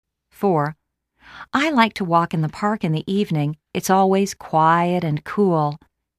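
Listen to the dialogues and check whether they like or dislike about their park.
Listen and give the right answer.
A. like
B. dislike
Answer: A. like

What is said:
4.I like to walk in the park in the evening. lt's always quiet and cool.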